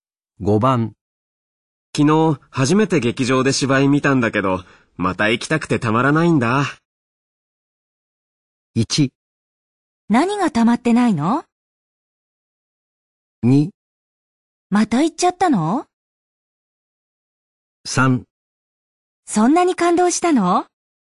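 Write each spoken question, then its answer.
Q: 昨日初めて劇場で芝居見たんだけど、また行きたくてたまらないんだ。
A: 3: そんなに感動したの?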